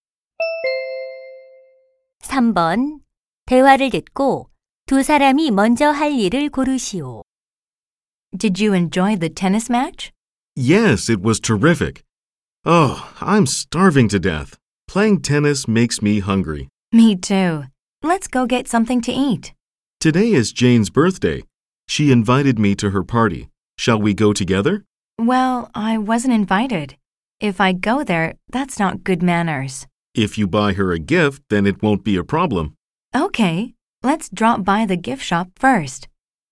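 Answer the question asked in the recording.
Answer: 선물 가게에 들르기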